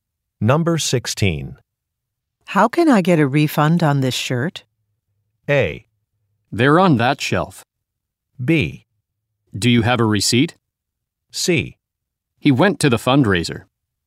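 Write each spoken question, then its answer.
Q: How can I get a refund on this shirt?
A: B: Do you have a receipt?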